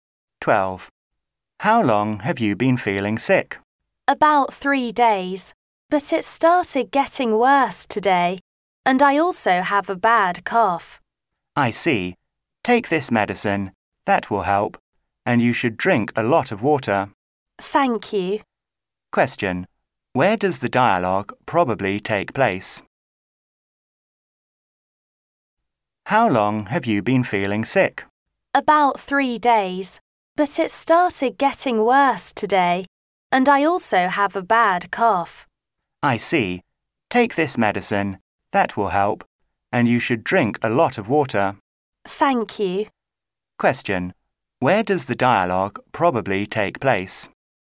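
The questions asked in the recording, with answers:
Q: Where does the dialogue probably take place?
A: In a hospital (at the doctor's)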